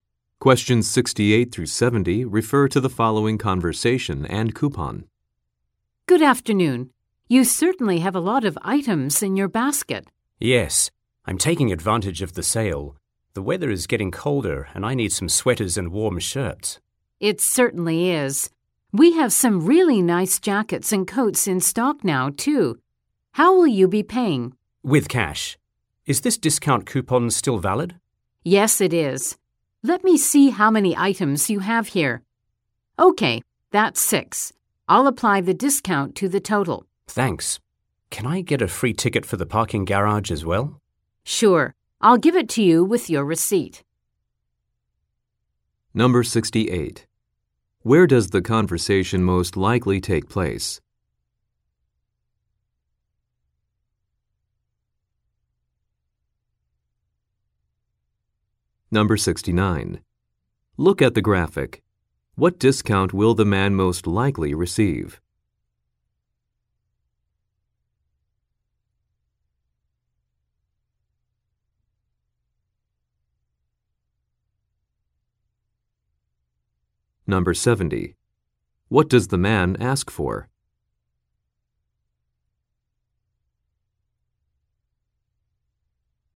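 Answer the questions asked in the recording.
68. At a clothing store
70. A free parking ticket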